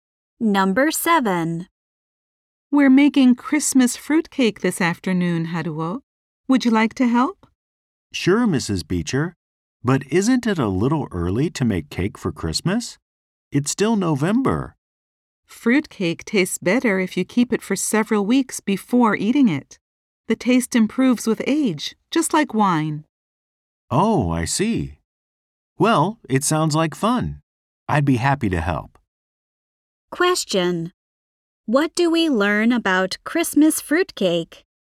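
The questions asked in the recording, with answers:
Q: What do we learn about Christmas fruitcake?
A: It tastes better if kept for several weeks before eating.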